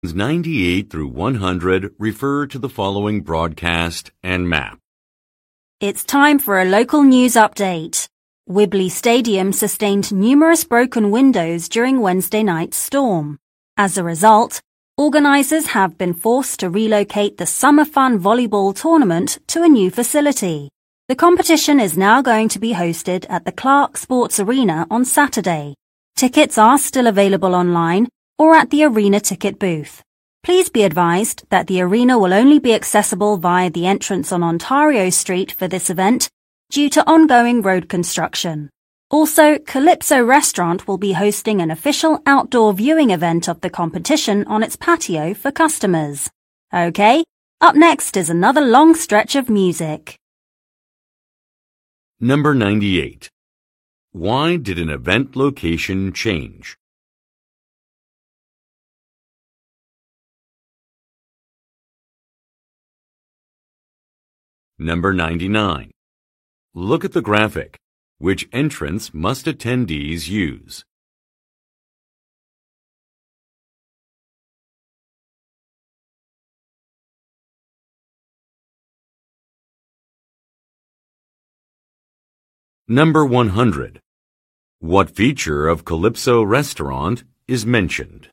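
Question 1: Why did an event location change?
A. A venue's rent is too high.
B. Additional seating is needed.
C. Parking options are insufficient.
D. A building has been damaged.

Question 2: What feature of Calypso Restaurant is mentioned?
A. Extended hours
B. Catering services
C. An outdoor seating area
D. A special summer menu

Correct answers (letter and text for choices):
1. D. A building has been damaged.
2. C. An outdoor seating area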